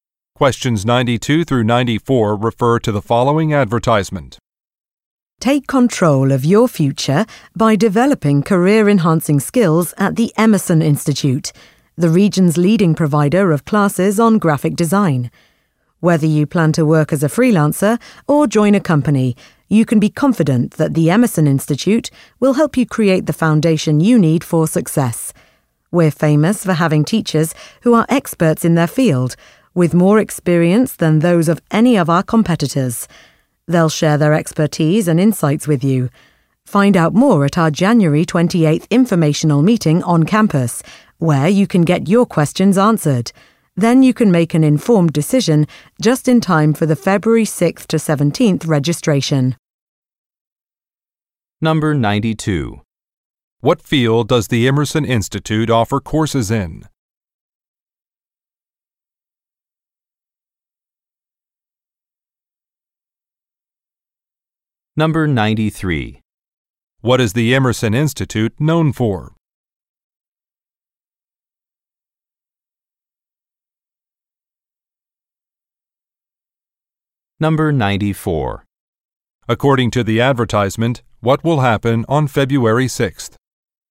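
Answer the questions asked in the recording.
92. Graphic design
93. Its experienced, expert teachers
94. Registration will begin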